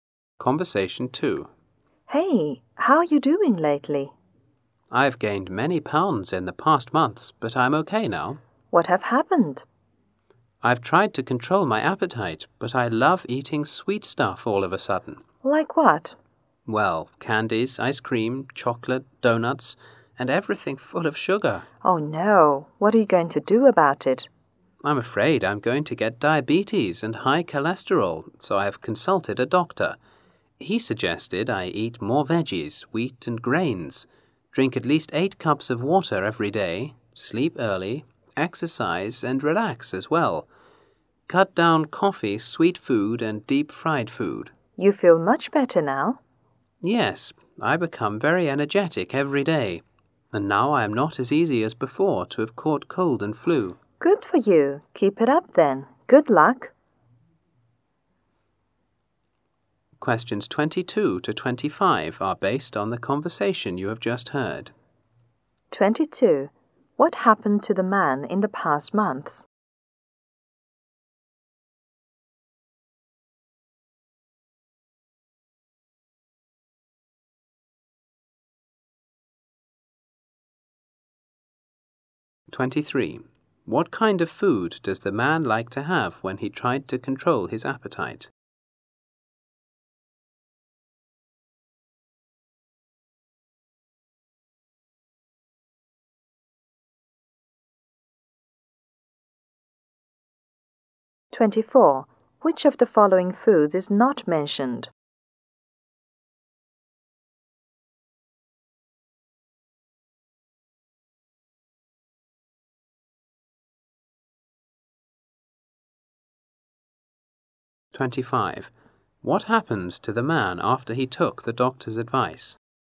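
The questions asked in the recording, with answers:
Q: What happened to the man in the past months?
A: He gained many pounds

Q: What kind of food does the man like to have when he tried to control his appetite?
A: Sweet foods

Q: What happened to the man after he took the doctor's advice?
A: He became very energetic and catches colds and flu less easily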